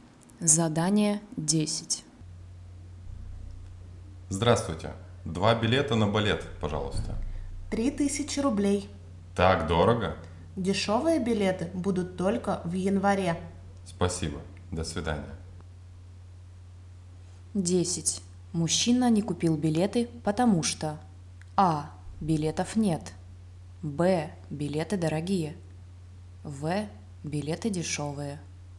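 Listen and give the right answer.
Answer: Б: билеты дорогие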